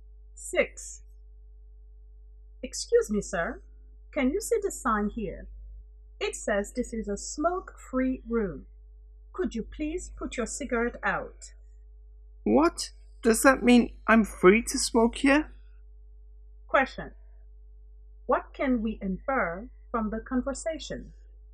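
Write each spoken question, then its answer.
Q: what can we infer from the conversation?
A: The man misunderstood the sign; smoking is not allowed there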